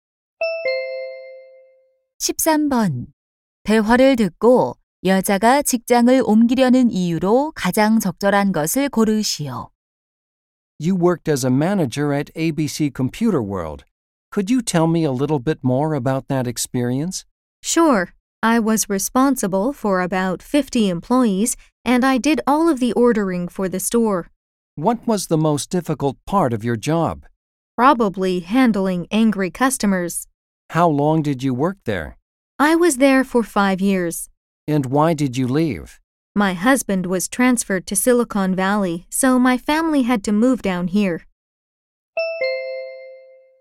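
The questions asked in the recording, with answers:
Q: 대화를 듣고 여자가 직장을 옮기려는 이유로 가장 적절한 것을 고르시오.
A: 남편의 전근으로 이사해서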